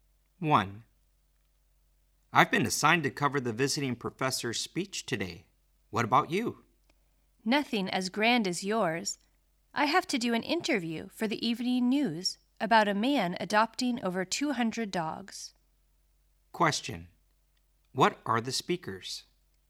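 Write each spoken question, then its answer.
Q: What are the speakers?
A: Reporters/journalists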